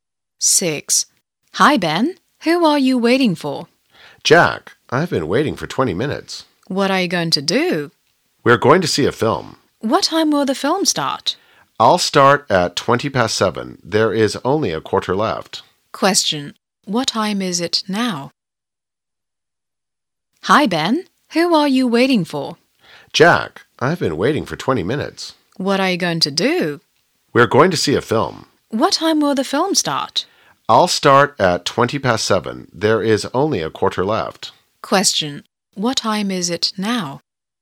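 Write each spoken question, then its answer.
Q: What time is it now?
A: 7:05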